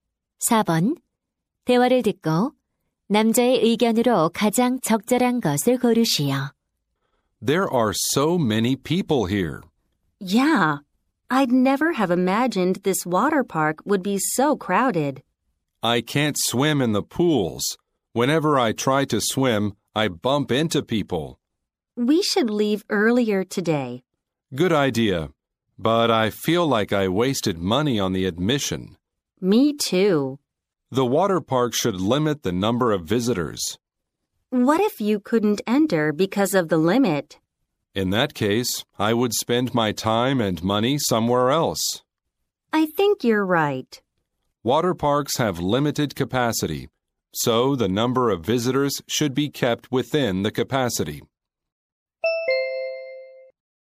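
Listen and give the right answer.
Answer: 워터파크는 입장객 수를 수용 인원 이내로 제한해야 한다.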